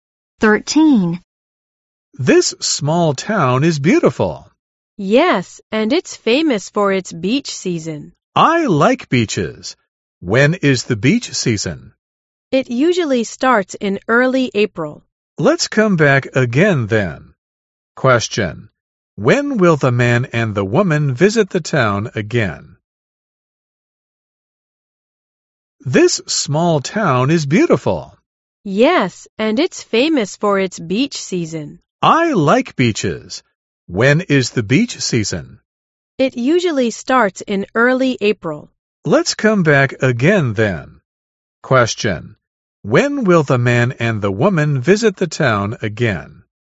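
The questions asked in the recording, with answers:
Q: Question: When will the man and the woman visit the town again?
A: In early April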